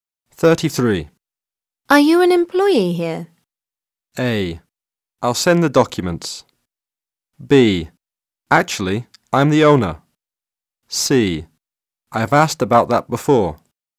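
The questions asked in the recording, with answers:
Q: Are you an employee here?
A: B: Actually, I'm the owner.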